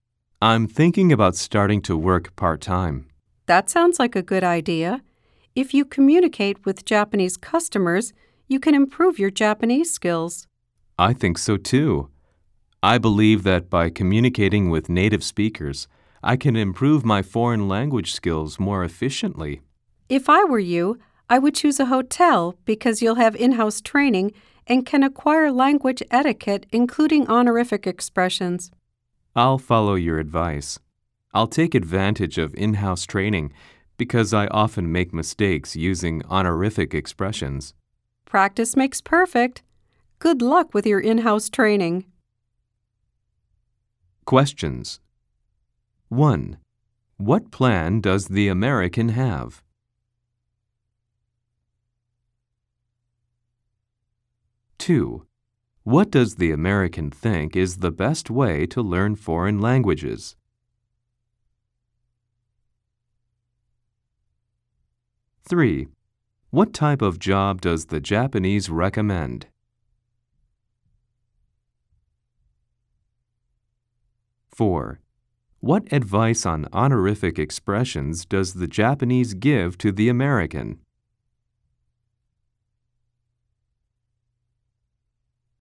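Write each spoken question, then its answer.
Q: What plan does the American have?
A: To start working part-time

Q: what does the American think is the best way to learn foreign languages?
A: Communicating with native speakers

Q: what type of job does the Japanese recommend?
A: A job at a hotel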